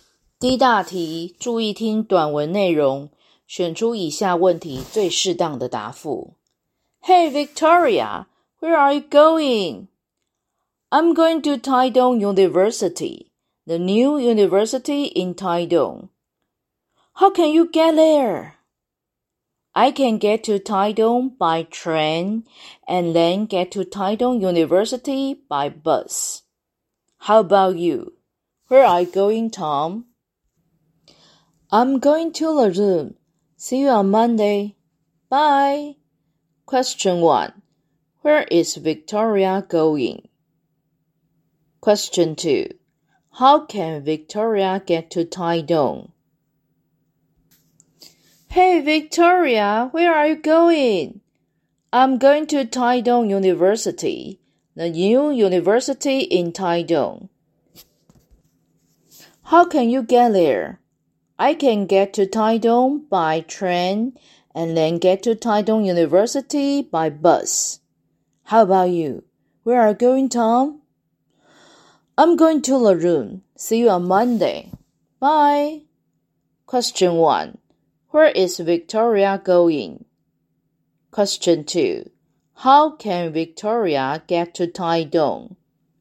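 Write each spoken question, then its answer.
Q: Where is Victoria going?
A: Taidong University

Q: How can Victoria get to Taidong?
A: By train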